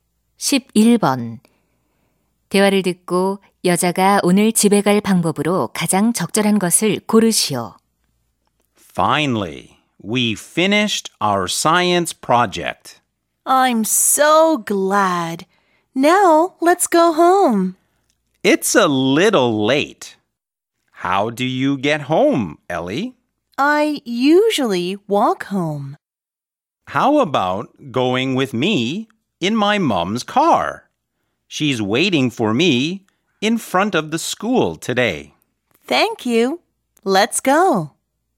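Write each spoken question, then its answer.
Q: 대화를 듣고 여자가 오늘 집에 갈 방법으로 가장 적절한 것을 고르시오.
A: 엄마 차를 타고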